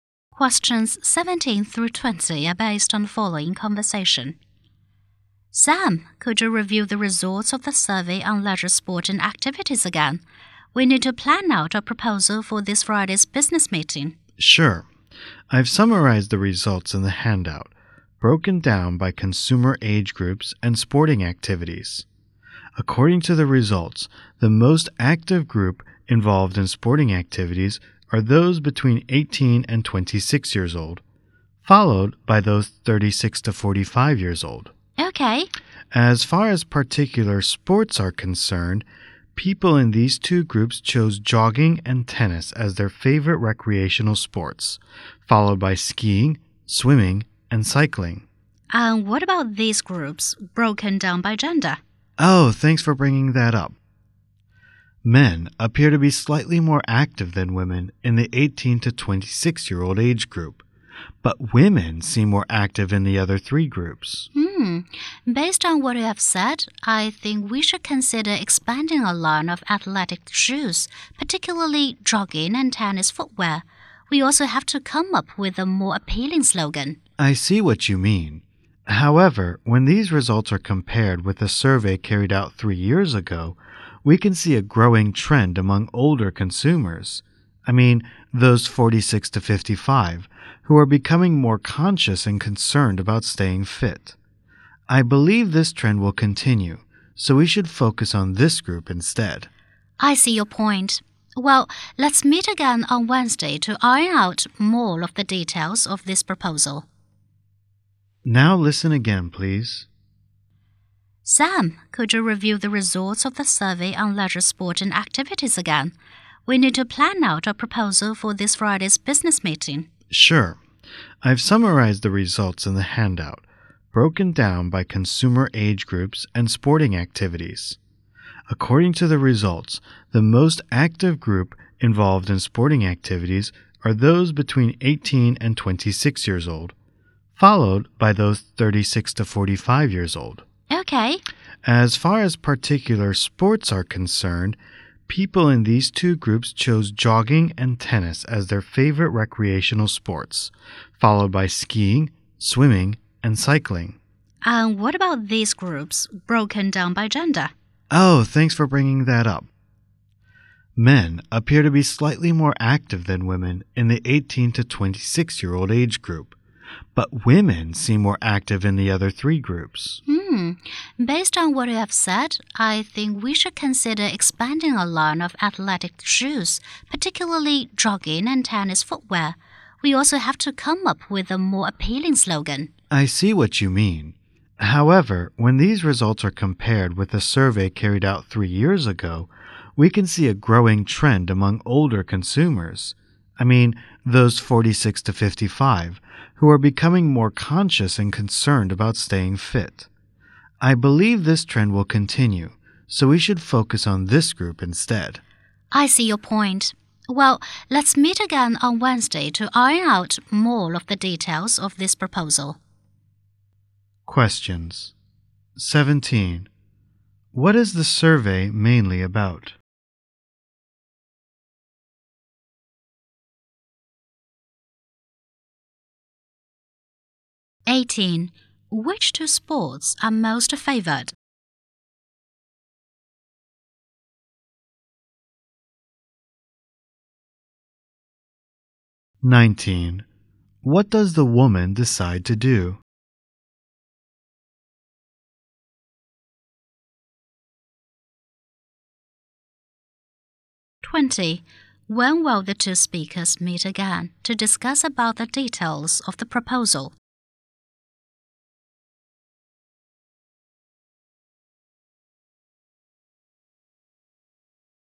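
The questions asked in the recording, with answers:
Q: What is the survey mainly about?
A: Leisure, sport and activities

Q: Which two sports are most favored?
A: Jogging and tennis

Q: When will the two speakers meet again to discuss about the details of the proposal?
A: On Wednesday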